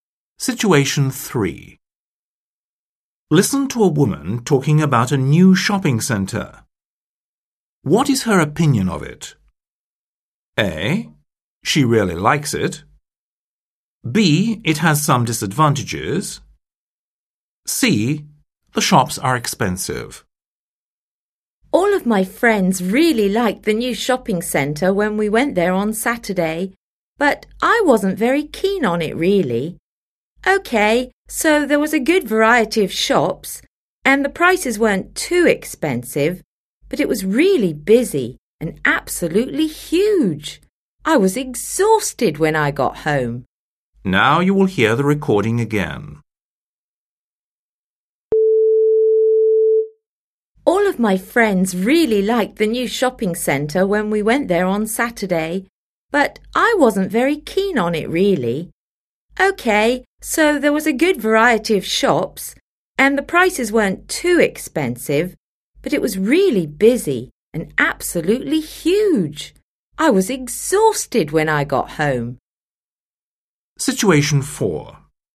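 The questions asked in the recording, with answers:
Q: What is her opinion of it?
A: B: It has some disadvantages.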